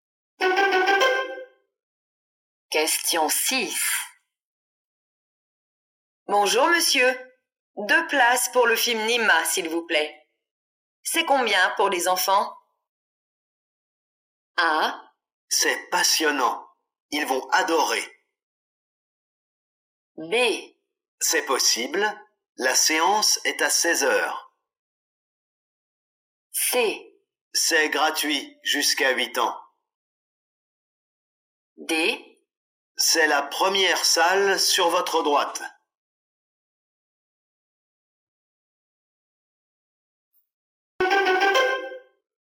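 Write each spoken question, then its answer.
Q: C'est combien pour les enfants?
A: C: C'est gratuit jusqu'à 8 ans.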